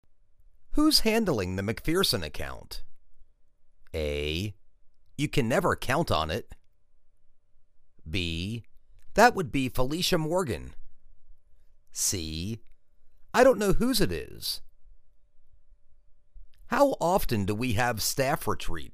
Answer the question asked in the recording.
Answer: That would be Felicia Morgan.